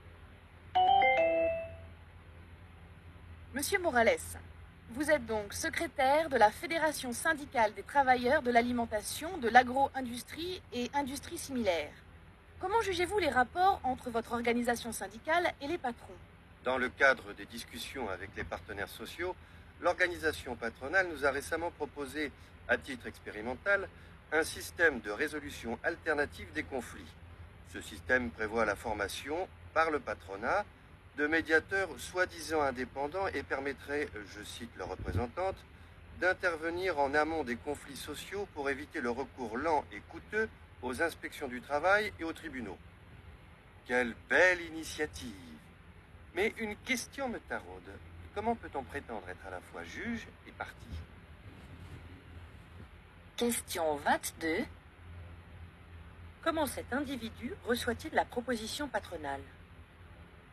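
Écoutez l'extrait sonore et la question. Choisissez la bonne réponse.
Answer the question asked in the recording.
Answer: Avec ironie et méfiance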